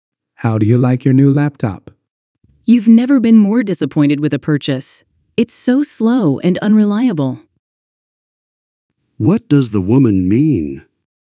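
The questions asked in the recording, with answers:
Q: What does the woman mean?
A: She is very disappointed with her new laptop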